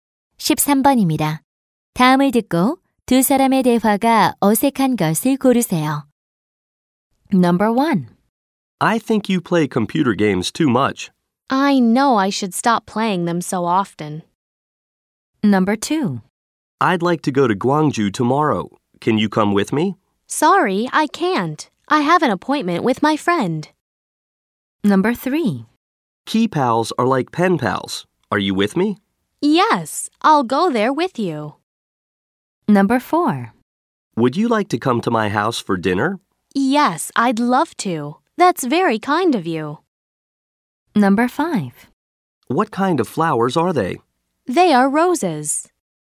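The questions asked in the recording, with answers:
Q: 다음을 듣고 두 사람의 대화가 어색한 것을 고르세요.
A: 3: Key pals are like pen pals. Are you with me? Yes, I'll go there with you.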